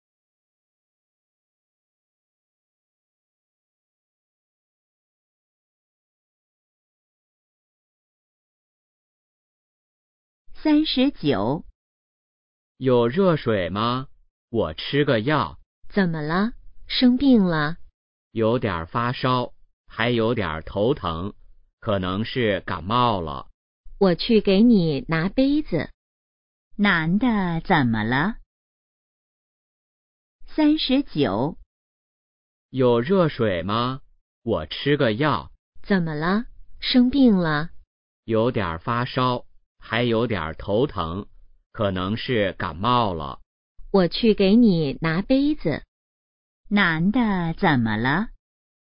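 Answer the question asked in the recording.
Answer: 可能感冒了(发烧、头疼)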